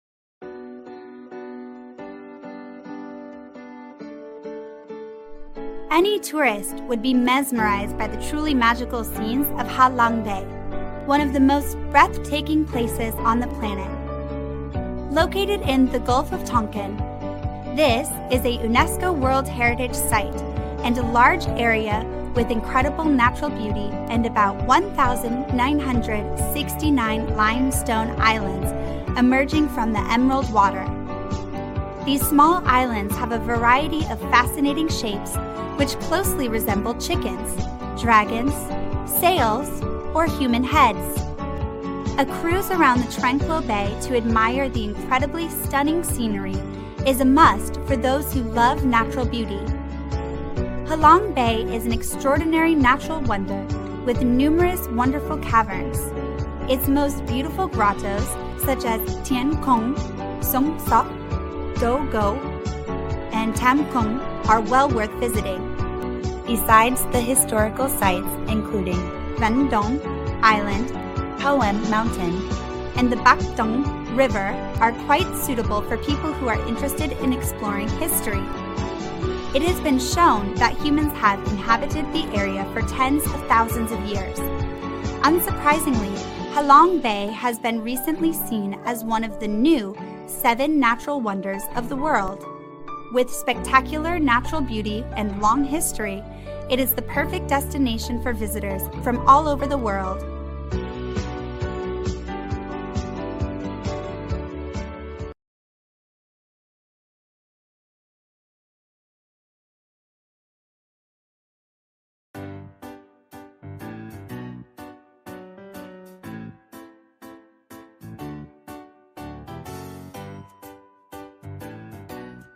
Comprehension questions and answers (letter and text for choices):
Task: Match the information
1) The Gulf of Tonkin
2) About 1,969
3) Thien Cung, Sung Sot, Du Go, Tam Cung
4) A UNESCO World Heritage Site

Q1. Ha Long Bay is located in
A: 1) The Gulf of Tonkin

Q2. The number of limestone islands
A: 2) About 1,969

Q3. Famous caves include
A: 3) Thien Cung, Sung Sot, Du Go, Tam Cung

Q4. It has been recognized as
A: 4) A UNESCO World Heritage Site

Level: lớp 9